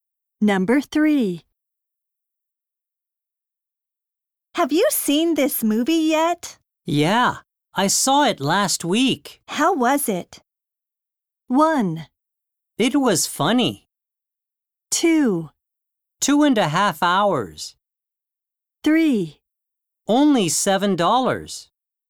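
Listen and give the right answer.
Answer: 1: It was funny.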